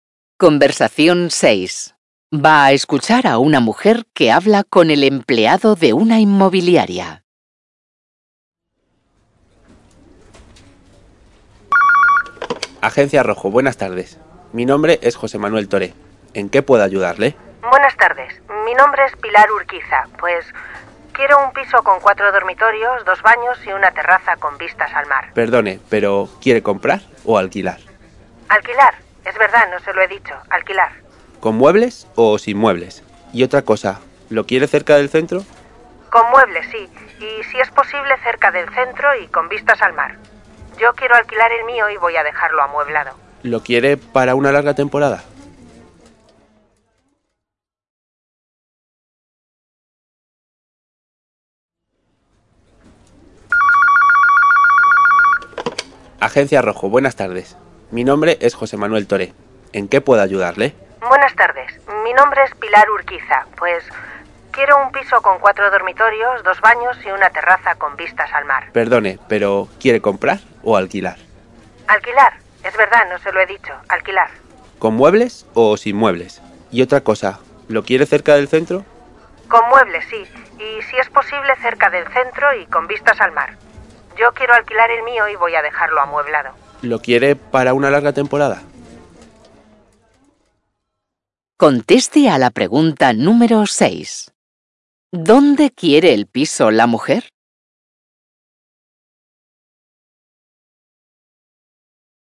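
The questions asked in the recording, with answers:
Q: ¿Dónde quiere el piso la mujer?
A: Cerca del centro y con vistas al mar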